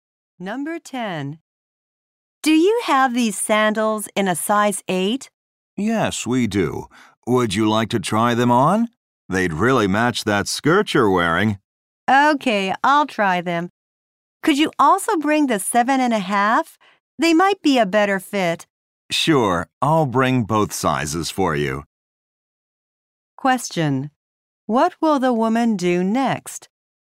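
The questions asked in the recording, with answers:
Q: What will the woman do next?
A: Try on the sandals.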